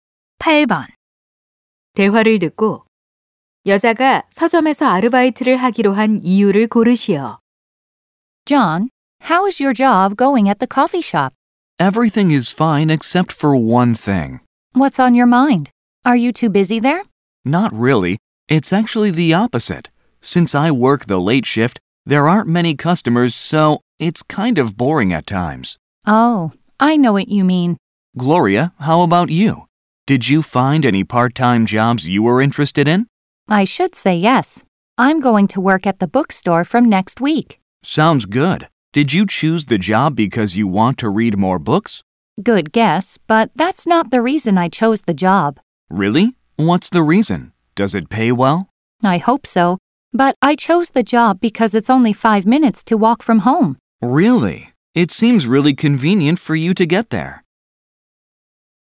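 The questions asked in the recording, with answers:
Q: 대화를 듣고 여자가 서점에서 아르바이트를 하기로 한 이유를 고르시오.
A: 집에서 걸어서 5분밖에 안 걸려서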